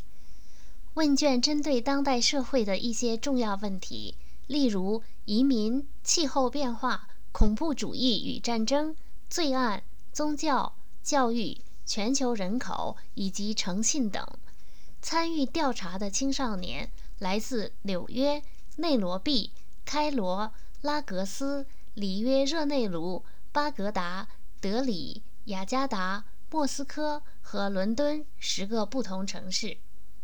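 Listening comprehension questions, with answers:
Please answer the following questions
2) 问卷调查了哪些重要的社会问题?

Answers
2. 移民、气候变化、恐怖主义与战争、罪案、宗教、教育、全球人口以及诚信等

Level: 3rd Year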